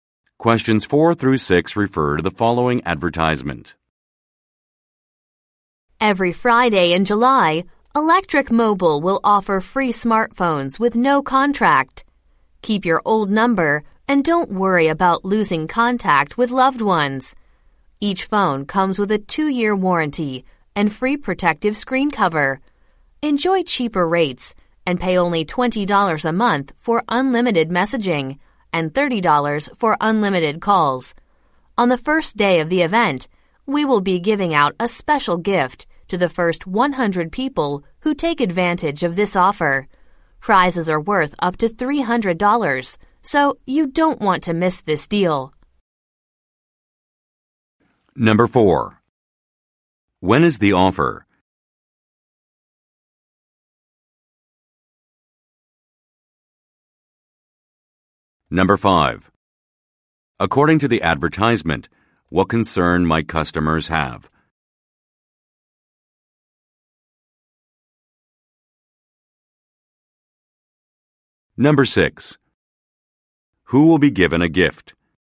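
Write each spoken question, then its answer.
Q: When is the offer?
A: Every Friday in July

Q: According to the advertisement, what concern might customers have?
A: Losing contact with loved ones (losing their number)

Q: Who will be given a gift?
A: The first 100 people on the first day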